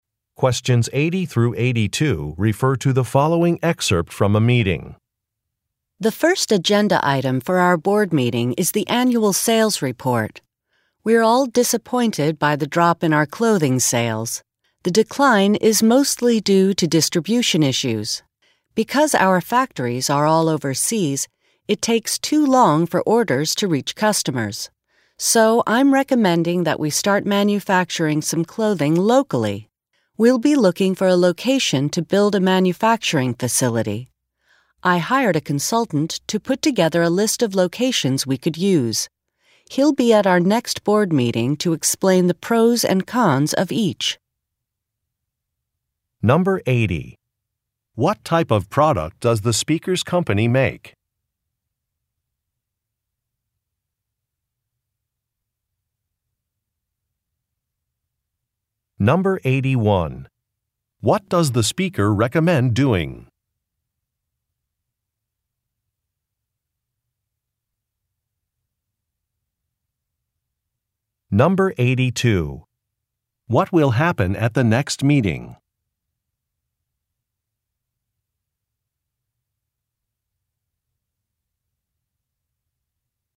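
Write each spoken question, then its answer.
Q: What type of product does the speaker's company make?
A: Clothing

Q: What does the speaker recommend doing?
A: Manufacturing some clothing locally

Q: What will happen at the next meeting?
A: A consultant will explain the pros and cons of possible locations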